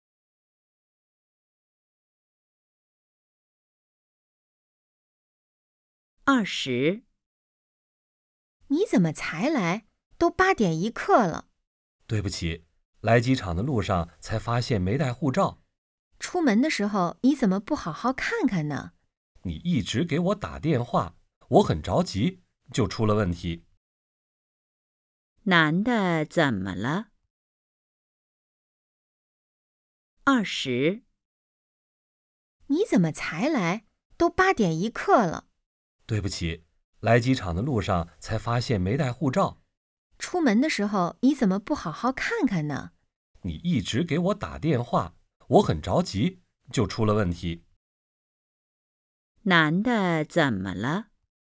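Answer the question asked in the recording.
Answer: 没带护照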